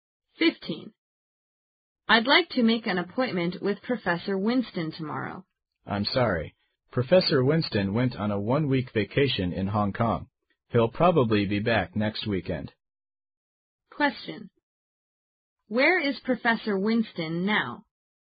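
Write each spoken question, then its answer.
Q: Where is Professor Winston now?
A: In Hong Kong, on vacation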